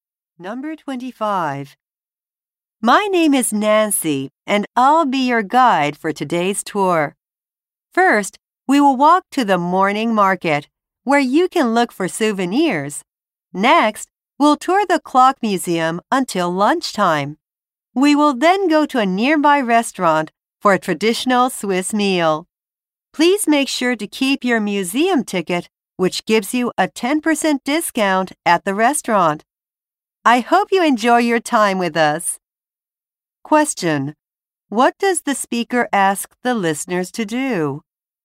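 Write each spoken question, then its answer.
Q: What does the speaker ask the listeners to do?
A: Keep their museum ticket.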